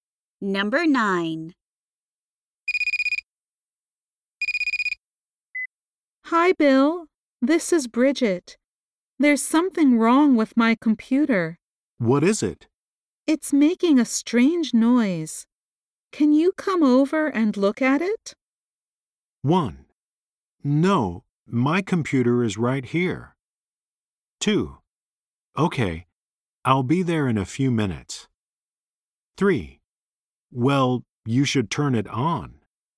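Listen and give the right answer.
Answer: 2: Okay, I'll be there in a few minutes.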